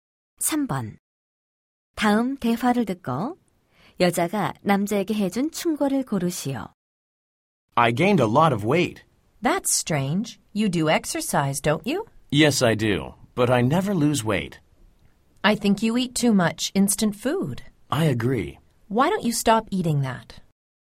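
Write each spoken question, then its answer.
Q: 다음 대화를 듣고 여자가 남자에게 해준 충고를 고르시오.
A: 인스턴트 음식을 그만 먹어라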